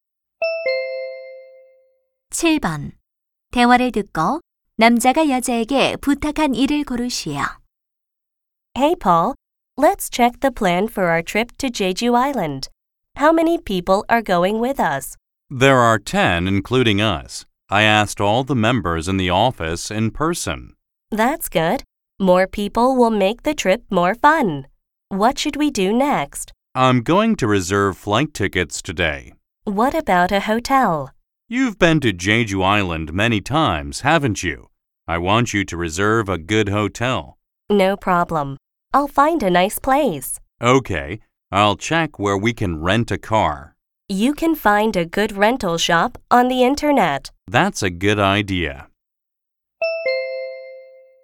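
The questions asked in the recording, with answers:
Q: 대화를 듣고 남자가 여자에게 부탁한 일을 고르시오.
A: 호텔 예약하기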